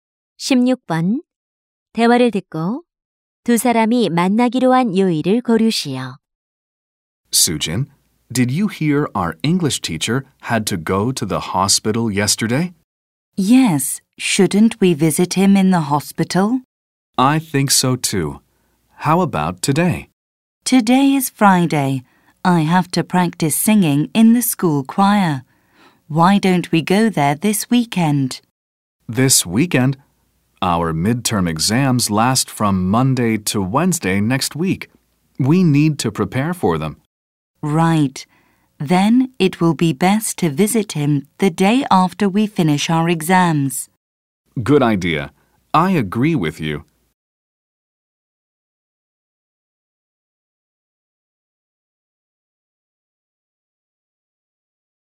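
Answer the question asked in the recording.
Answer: 목요일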